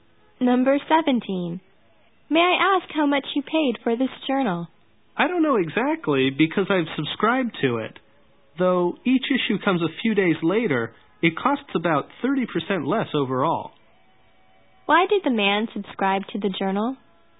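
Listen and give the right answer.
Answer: It costs about 30% less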